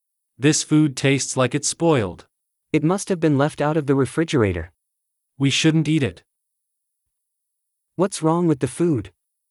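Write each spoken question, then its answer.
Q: What's wrong with the food?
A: It's spoiled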